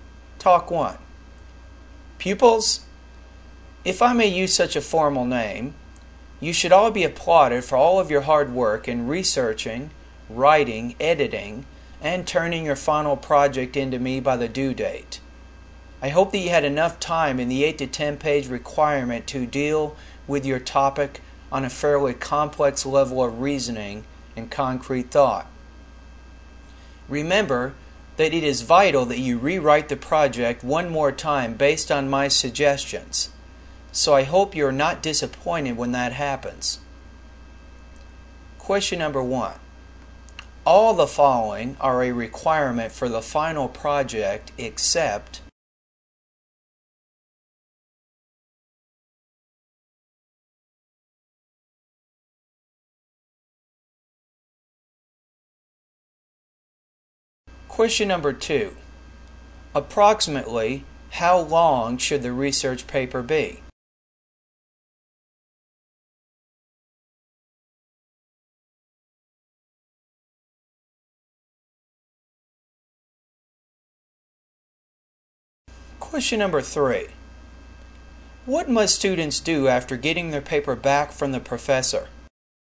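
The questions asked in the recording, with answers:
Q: Approximately, how long should the research paper be?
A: 8 to 10 pages

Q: What must students do after getting their paper back from the professor?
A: Rewrite it one more time based on the professor's suggestions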